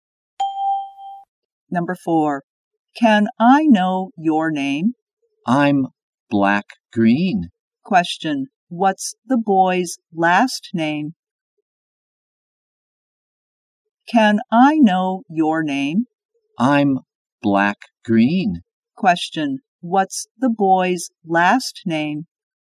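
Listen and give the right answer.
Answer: Green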